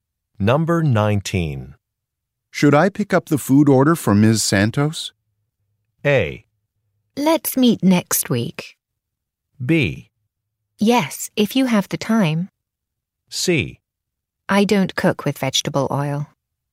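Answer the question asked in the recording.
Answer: B: Yes, if you have the time.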